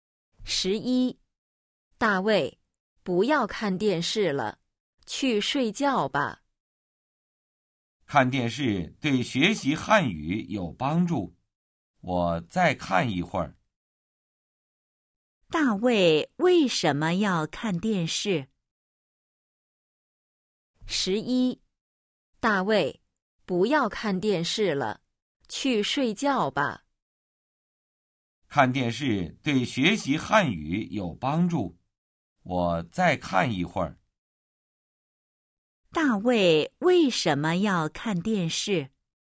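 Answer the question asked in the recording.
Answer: 看电视对学习汉语有帮助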